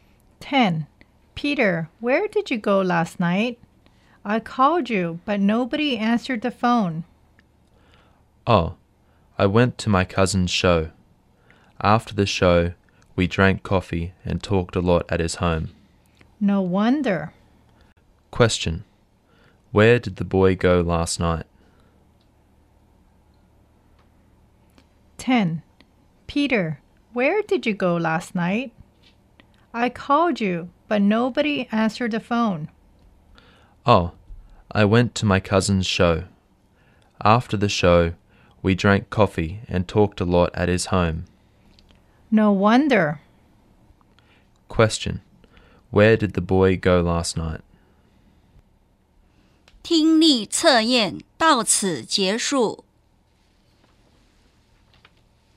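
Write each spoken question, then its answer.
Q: Question. Where did the boy go last night?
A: To his cousin's show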